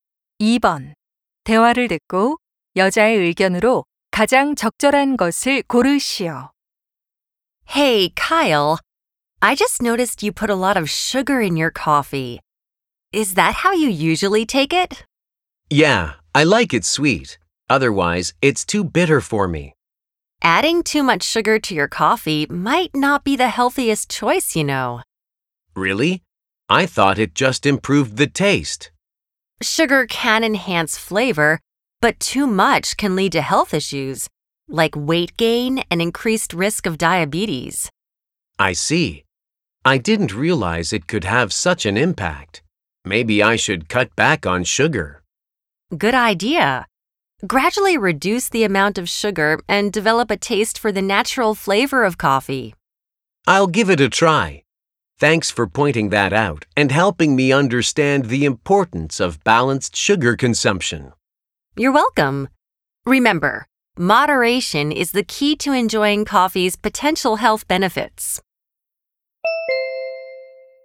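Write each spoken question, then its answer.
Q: 대화를 듣고 여자의 의견으로 가장 적절한 것을 고르시오.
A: 커피에 설탕을 너무 많이 넣는 것은 건강에 좋지 않다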